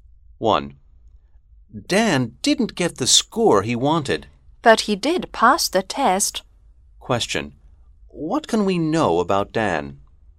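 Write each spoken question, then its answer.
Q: What can we know about Dan?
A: He passed the test but didn't get the score he wanted.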